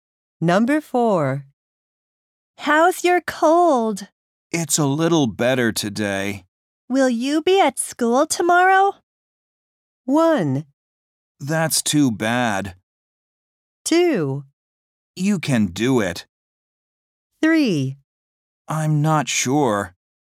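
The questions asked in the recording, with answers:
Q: Will you be at school tomorrow?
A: 3: I'm not sure.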